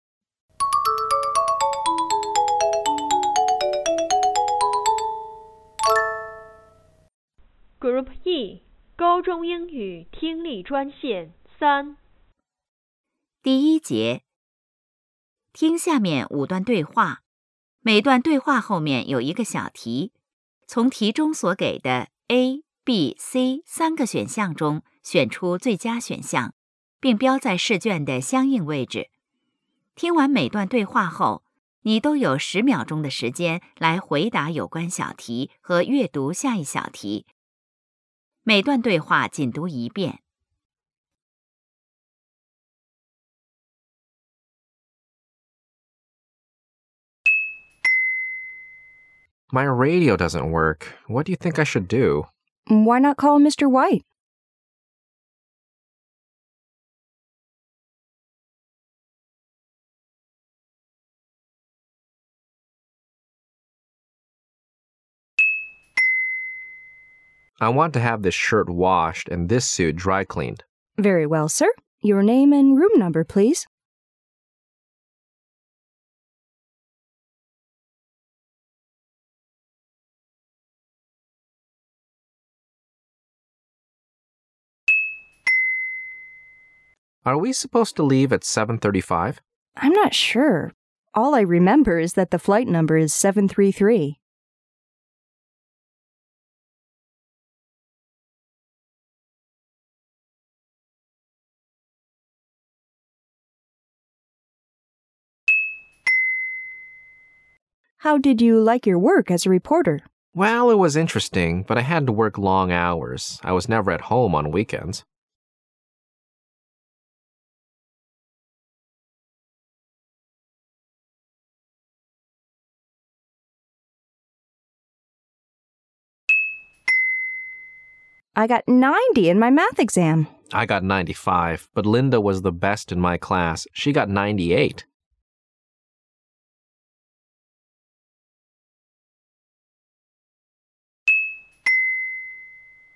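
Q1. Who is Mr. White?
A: A repairman.

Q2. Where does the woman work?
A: At a hotel.

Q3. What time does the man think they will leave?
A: At 7:35.

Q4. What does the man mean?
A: He didn't like the work so much because it kept him working long hours.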